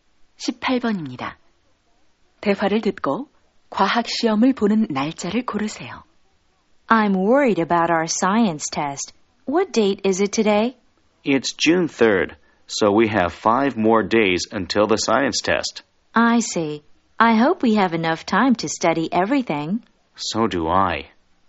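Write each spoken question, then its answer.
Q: 대화를 듣고 과학 시험을 보는 날짜를 고르세요.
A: 6월 8일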